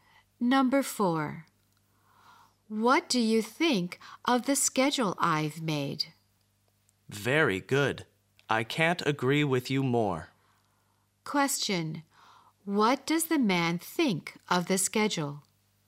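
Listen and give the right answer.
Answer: It is very good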